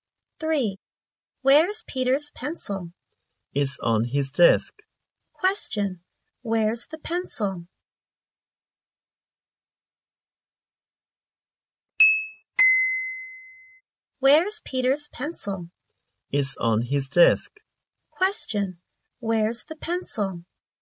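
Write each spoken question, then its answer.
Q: where's the pencil?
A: On Peter's desk.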